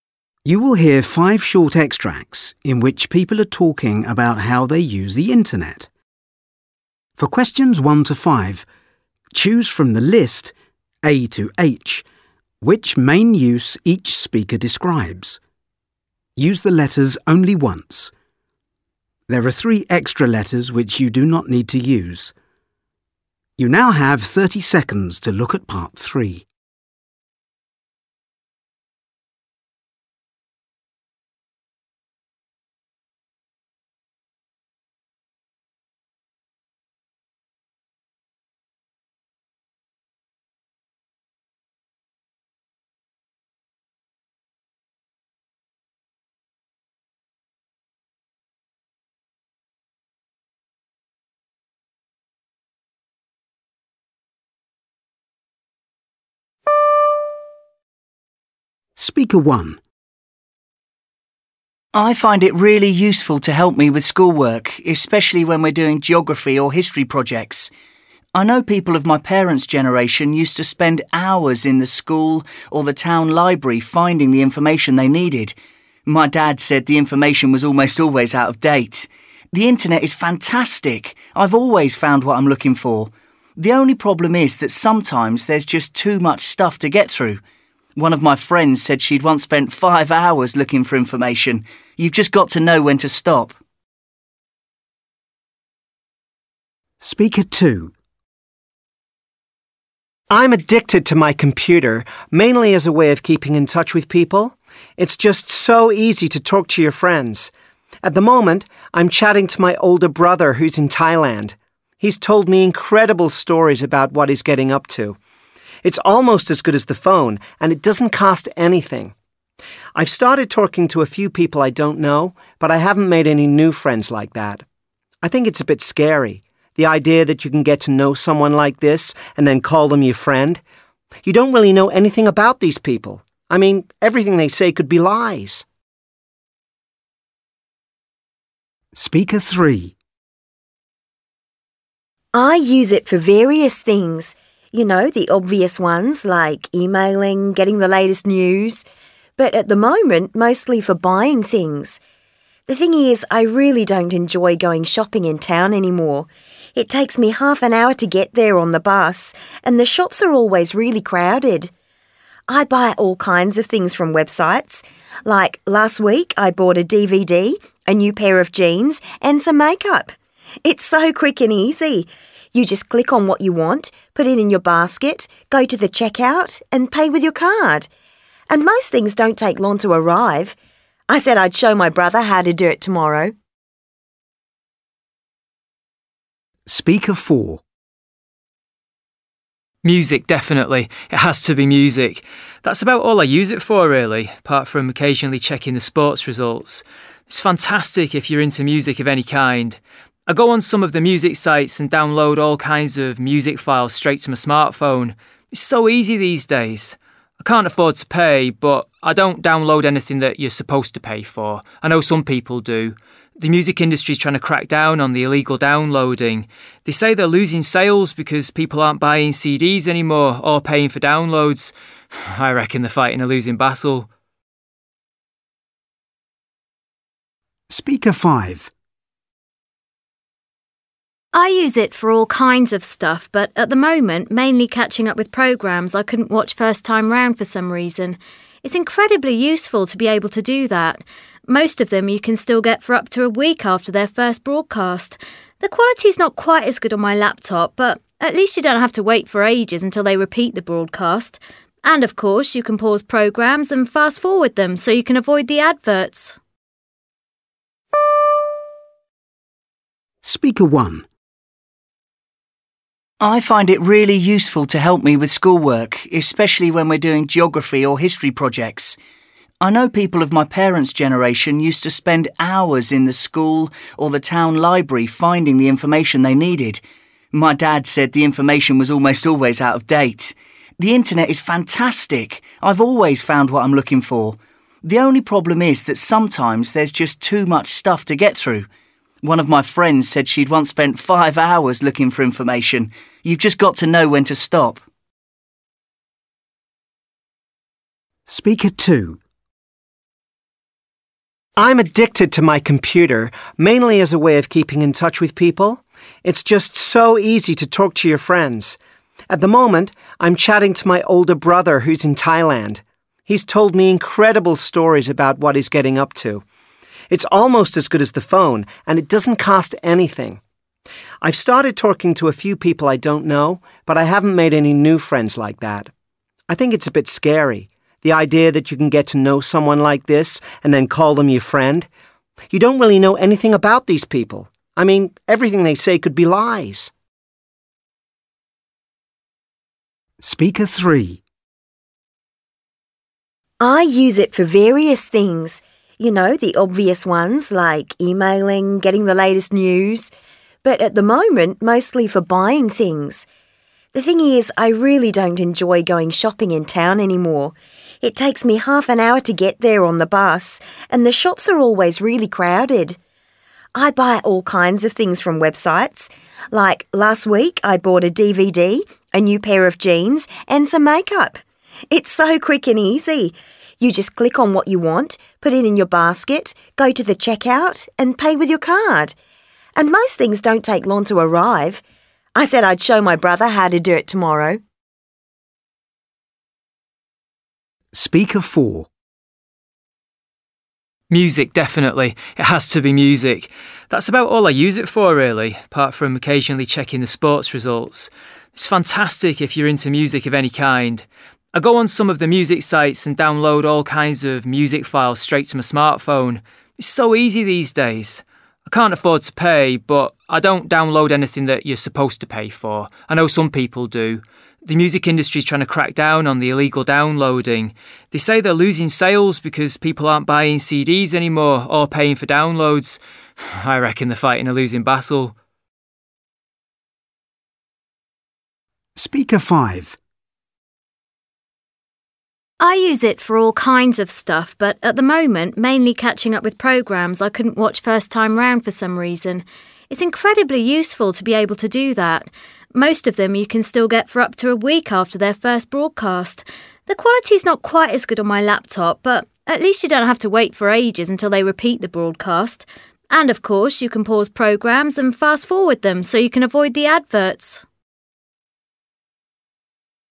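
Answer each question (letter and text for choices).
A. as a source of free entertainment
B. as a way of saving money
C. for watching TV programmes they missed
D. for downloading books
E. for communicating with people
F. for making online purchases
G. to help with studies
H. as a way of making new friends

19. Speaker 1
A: G. to help with studies

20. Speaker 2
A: E. for communicating with people

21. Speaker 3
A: F. for making online purchases

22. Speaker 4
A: A. as a source of free entertainment

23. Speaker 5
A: C. for watching TV programmes they missed

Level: FCE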